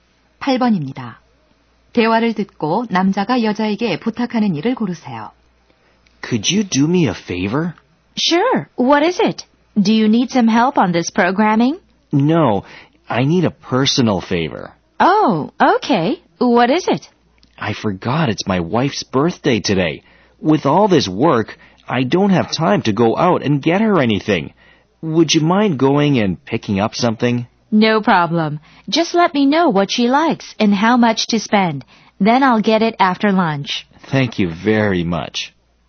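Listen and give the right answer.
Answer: 아내의 생일 선물을 사다 달라는 것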